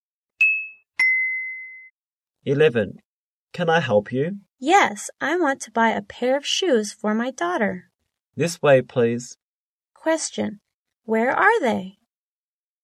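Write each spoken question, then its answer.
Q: Where are they?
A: In a shoe store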